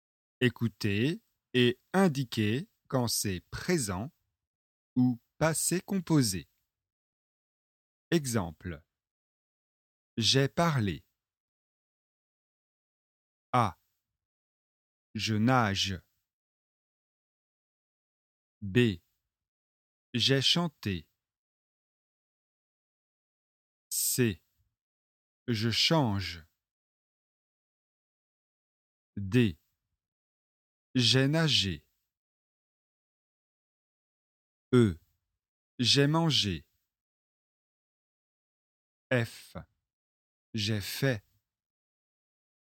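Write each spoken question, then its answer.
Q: Je nage.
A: présent

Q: J'ai chanté.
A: passé composé

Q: Je change.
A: présent

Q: J'ai nagé.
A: passé composé

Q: J'ai mangé.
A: passé composé

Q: J'ai fait.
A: passé composé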